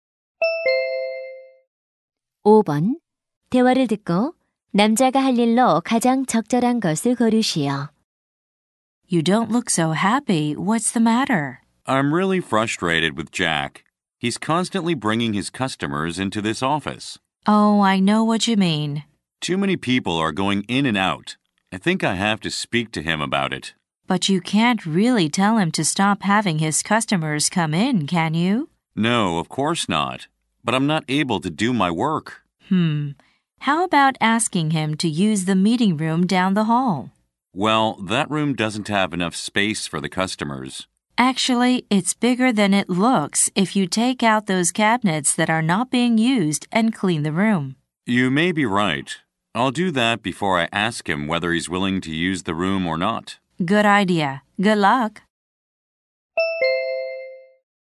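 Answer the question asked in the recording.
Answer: 회의실의 안 쓰는 캐비닛을 치우고 청소하기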